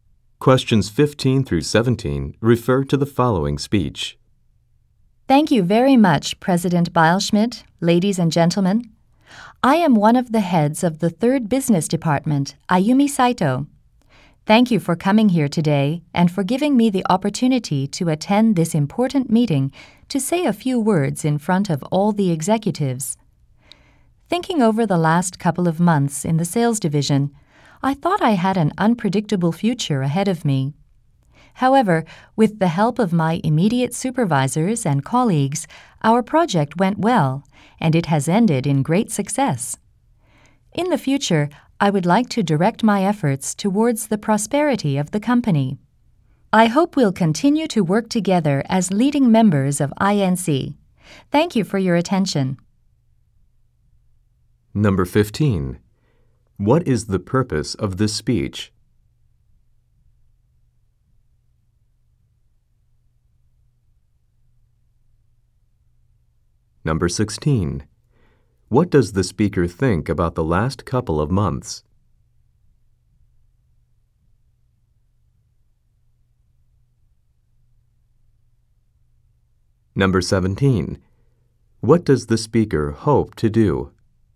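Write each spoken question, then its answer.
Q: What does the speaker hope to do?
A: Work toward the company's prosperity and keep working together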